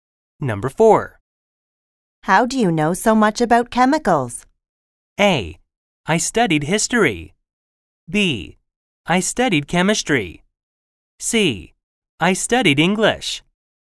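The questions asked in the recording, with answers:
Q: How do you know so much about chemicals?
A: B: I studied chemistry.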